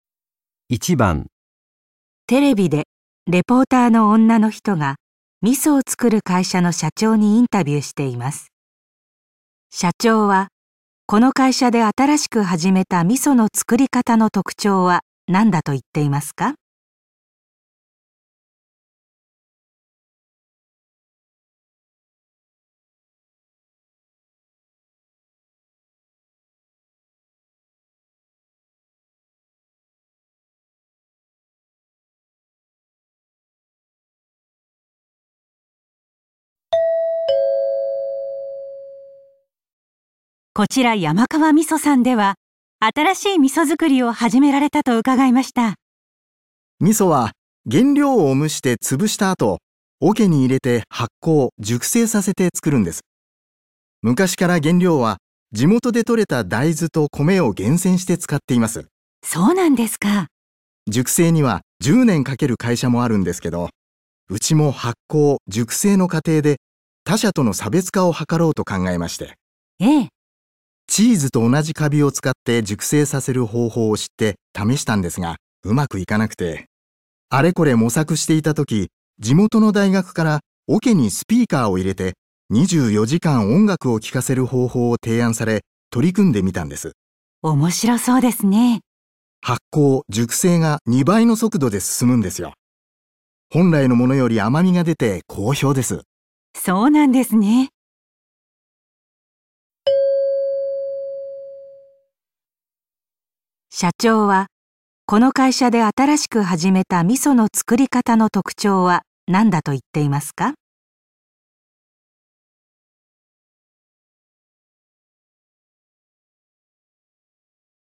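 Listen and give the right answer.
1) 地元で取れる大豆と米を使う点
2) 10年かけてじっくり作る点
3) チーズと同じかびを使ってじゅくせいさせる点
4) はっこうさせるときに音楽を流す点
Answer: 4) はっこうさせるときに音楽を流す点

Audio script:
女:こちら山川味噌さんでは新しい味噌づくりを始められたと伺いました。
男:味噌は原料を蒸して潰した後、 桶に入れて発酵・熟成させて作るんです。 昔から原料は地元でとれた大豆と米を厳選して使っています。
女:そうなんですか。
男:熟成には10年かける会社もあるんですけど、うちも発酵・熟成の過程で他社との差別化を図ろうと考え まして。
女:ええ。
男:チーズと同じカビを使って熟成させる方法を知って、試したんですが、上手くいかなくて・・・。 あれこれ模索 していた時、地元の大学から桶にスピーカーを入れて24時間音楽を聴かせる方法を提案され、取り組んで みたんです。
女:面白そうですね。
男:発酵・熟成が2倍の速度で進むんですよ。 本来のものより甘みが出て好評です。
社長はこの会社で新しく始めた味噌の作り方の特徴は何だと言っていますか。

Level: N1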